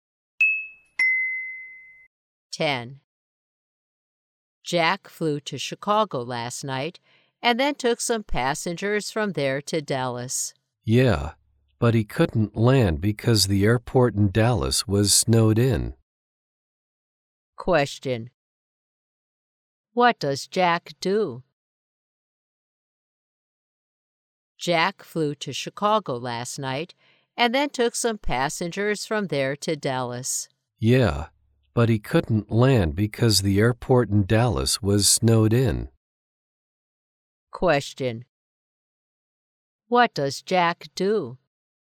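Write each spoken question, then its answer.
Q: What does Jack do?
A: He is a pilot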